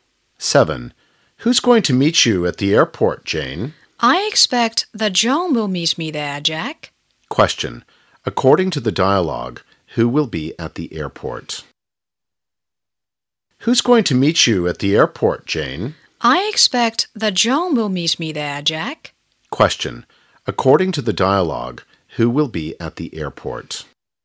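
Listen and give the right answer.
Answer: John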